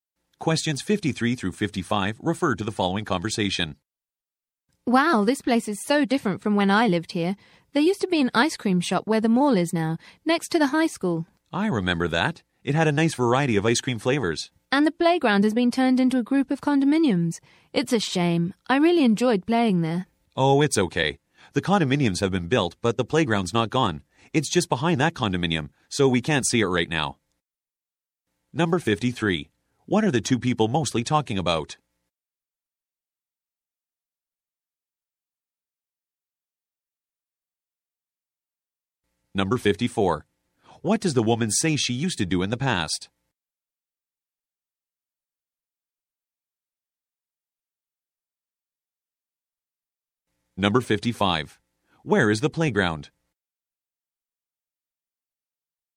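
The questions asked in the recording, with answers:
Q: What are the two people mostly talking about?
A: How their old neighborhood has changed

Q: Where is the playground?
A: Behind the condominium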